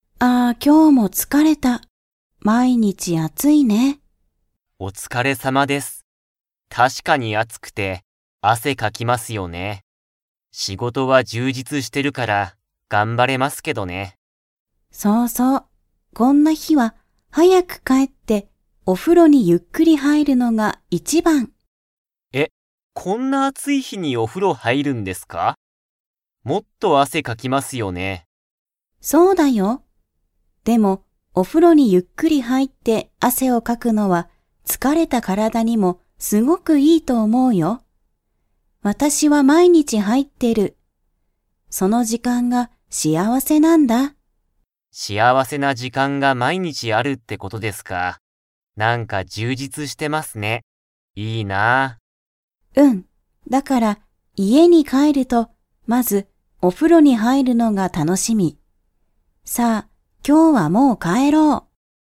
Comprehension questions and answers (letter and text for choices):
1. イトウさんは、何なにが充実じゅうじつしていますか?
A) お風呂ふろ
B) 汗あせ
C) 仕事しごと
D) 幸しあわせ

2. タナカさんは、お風呂ふろに入はいるのが 。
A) 楽たのしみ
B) 嫌きらい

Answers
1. C) 仕事しごと
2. A) 楽たのしみ

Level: Level 4